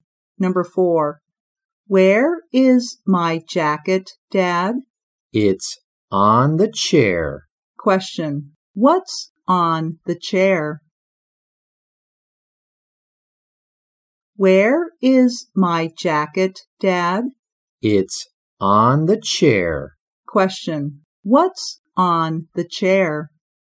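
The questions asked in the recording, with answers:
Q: Question. What's on the chair?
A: The jacket.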